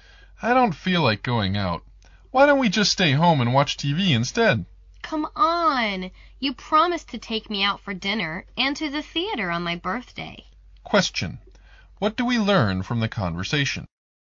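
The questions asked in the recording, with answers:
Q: What do we learn from the conversation?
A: The woman wants to go out for her birthday as the man promised, but he'd rather stay home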